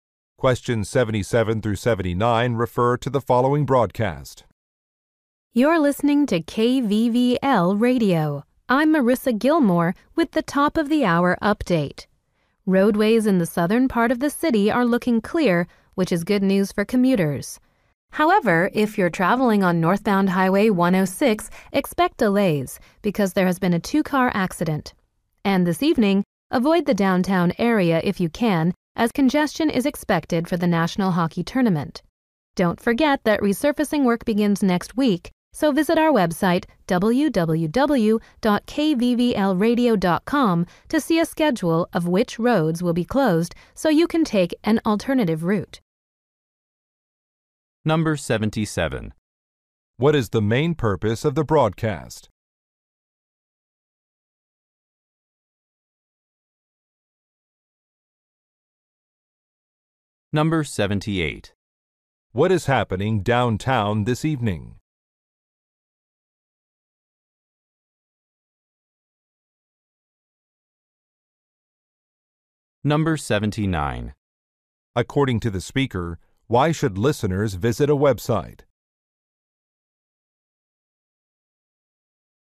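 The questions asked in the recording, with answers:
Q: What is the main purpose of the broadcast?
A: To give a traffic update

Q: What is happening downtown this evening?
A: A hockey tournament

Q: According to the speaker, why should listeners visit a website?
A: To see a schedule of road closures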